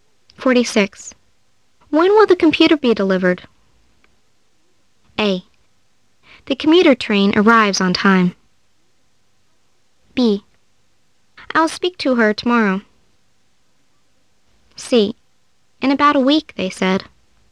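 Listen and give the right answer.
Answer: C: In about a week, they said.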